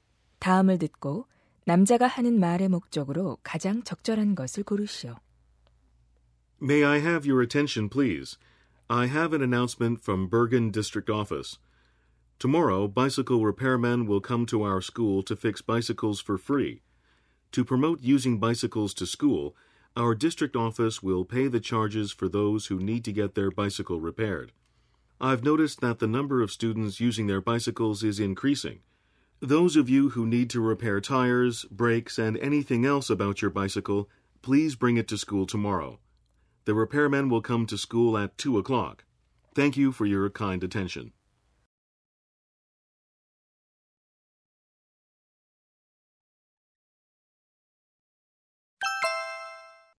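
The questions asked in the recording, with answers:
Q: 다음을 듣고 남자가 하는 말의 목적으로 가장 적절한 것을 고르시오.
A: 학교에서 무료 자전거 수리 서비스가 있음을 알리려고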